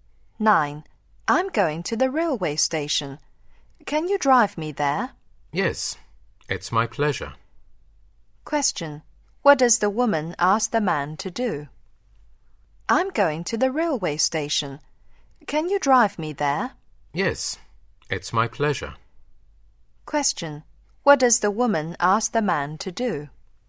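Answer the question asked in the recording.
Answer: Drive her to the railway station.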